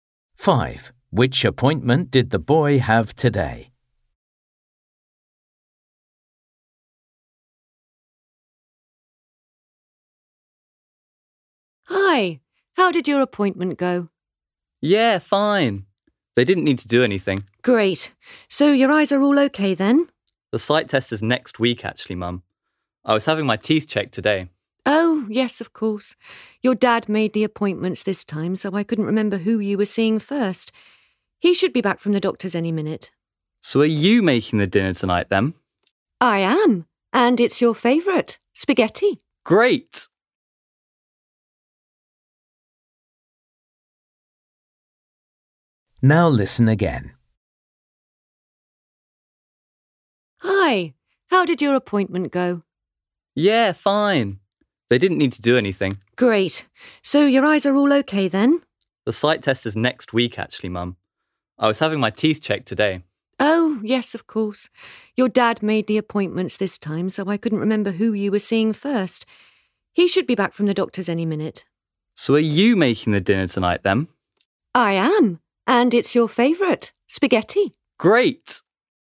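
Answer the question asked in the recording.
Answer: the dentist (teeth check)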